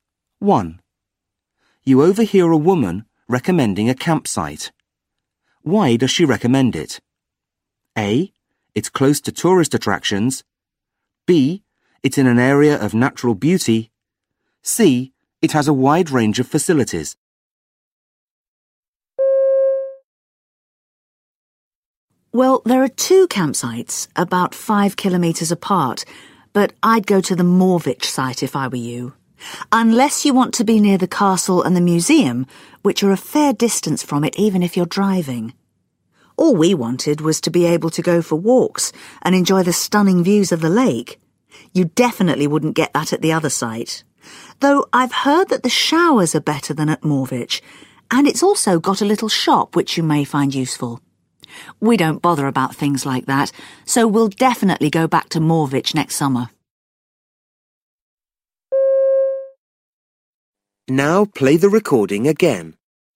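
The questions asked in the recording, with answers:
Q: Why does she recommend it?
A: B: It's in an area of natural beauty.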